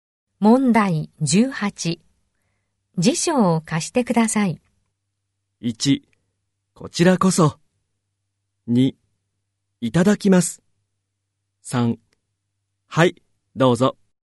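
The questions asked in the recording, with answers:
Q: 辞書を貸してください。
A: 3: はい、どうぞ。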